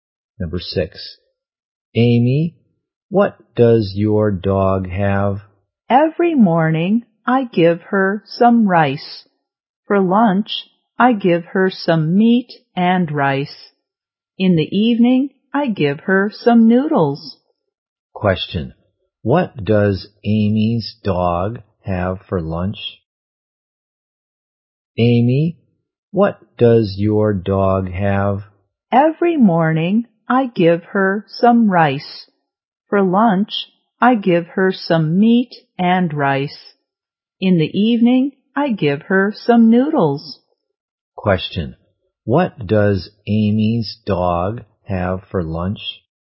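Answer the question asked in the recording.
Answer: Meat and rice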